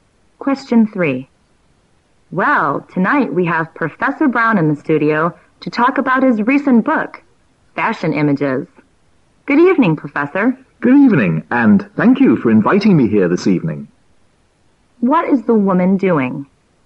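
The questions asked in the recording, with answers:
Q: What is the woman doing?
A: Hosting a studio interview with Professor Brown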